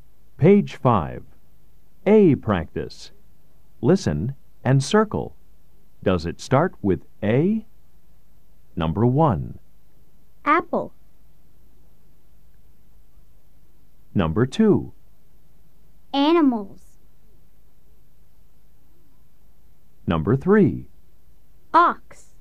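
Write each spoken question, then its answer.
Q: Does it start with A?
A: Yes (apple)

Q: Does it start with A?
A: Yes (animals)

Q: Does it start with A?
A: No (ox)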